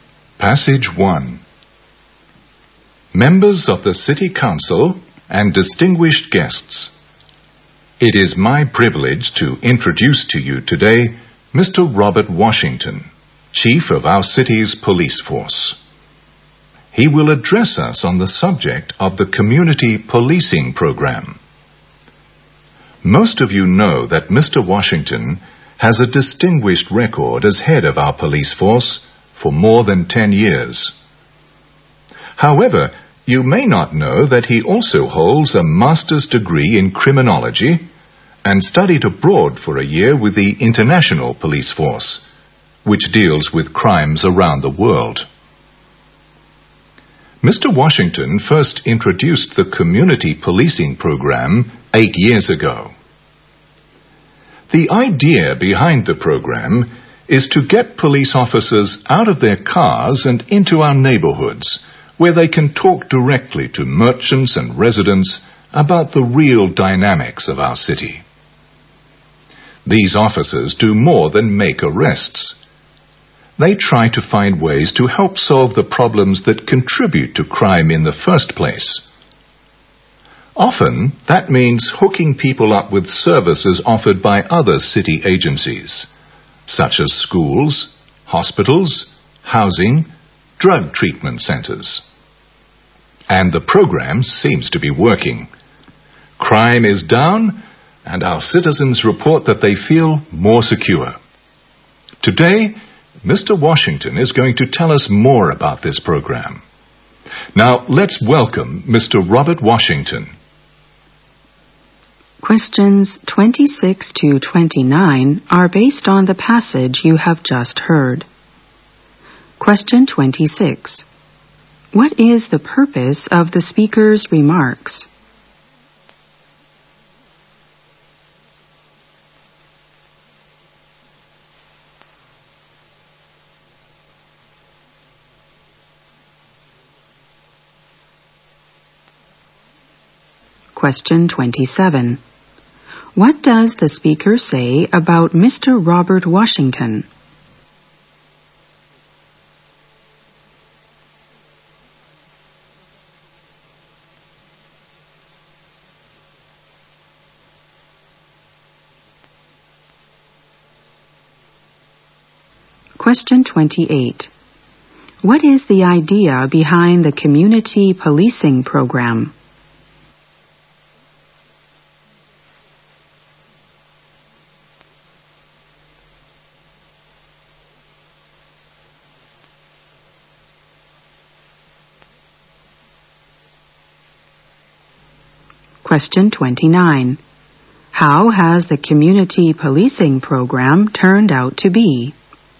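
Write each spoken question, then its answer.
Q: What is the purpose of the speaker's remarks?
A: To introduce Robert Washington, the police chief

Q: What does the speaker say about Mr. Robert Washington?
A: He has headed the police force for over 10 years with a distinguished record.

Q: What is the idea behind the community policing program?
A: To get police officers out of their cars and into neighborhoods to talk with merchants and residents

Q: How has the community policing program turned out to be?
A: Successful: crime is down and citizens feel more secure.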